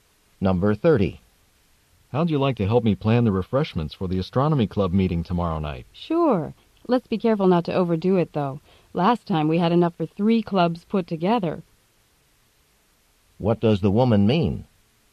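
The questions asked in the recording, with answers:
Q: What does the woman mean?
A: She'll help, but they shouldn't prepare too much food, since last time there was far too much.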